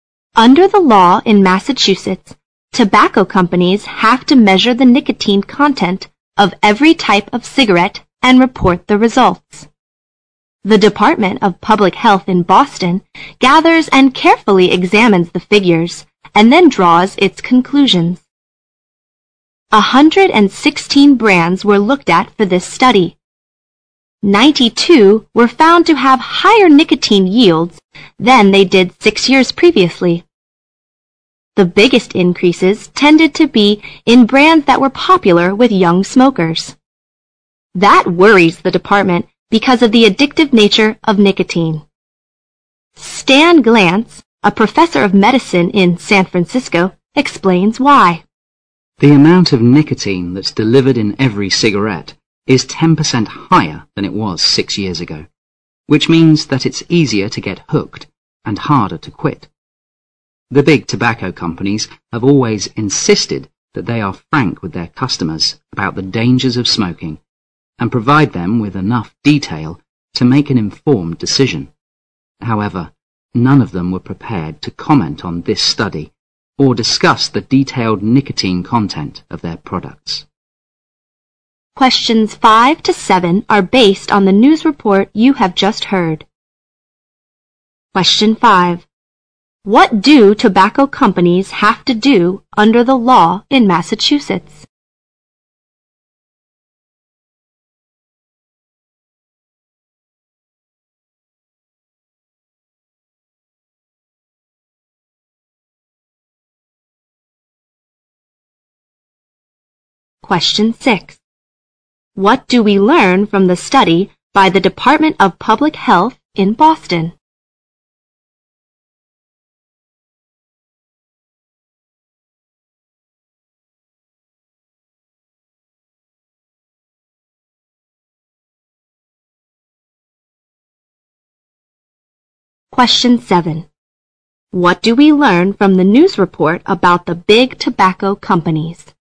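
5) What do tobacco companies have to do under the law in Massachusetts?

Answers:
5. Measure the nicotine content of every type of cigarette and report the results

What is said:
Under the law in Massachusetts, tobacco companies have to measure the nicotine content of every type of cigarette and report the results. The Department of Public Health in Boston gathers and carefully examines the figures and then draws its conclusion. A hundred and sixteen brands were looked at for the study. Ninety two were found to have higher nicotine yields than they did six years previously. The biggest increases tended to be in brands that were popular with young smokers. That worries the department because of the addictive nature of nicotine. Stand Glance, a professor of medicine in San Francisco, explains why: "The amount of nicotine that is delivered in every cigarette is ten percent higher than it was six year ago, which means that is easier to get hooked and harder to quit. 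The big tobacco companies have always insisted that they are frank with their customers about the dangers of smoking and provide them with enough detail to make an informed decision. However, none of them were prepared to comment on this study or discuss the detailed nicotine content of their products."
Question 5. What do tobacco companies have to do under the law in Massachusetts?
Question 6.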